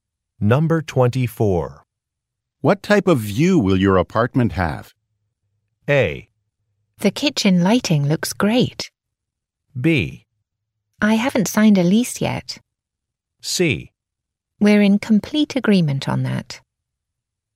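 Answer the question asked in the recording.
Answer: B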